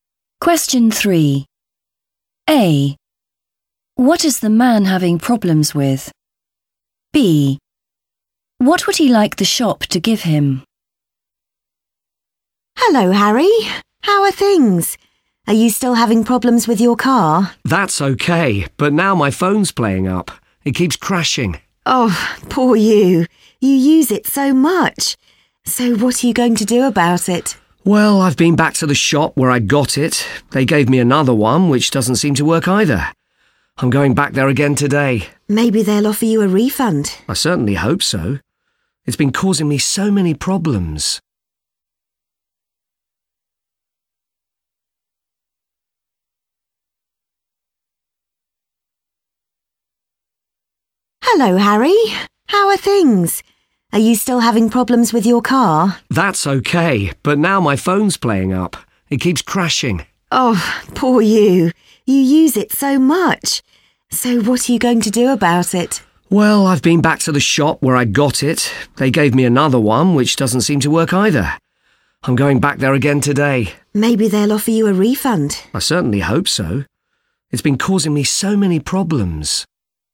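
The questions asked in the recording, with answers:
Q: What is the man having problems with?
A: his phone

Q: What would he like the shop to give him?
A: a refund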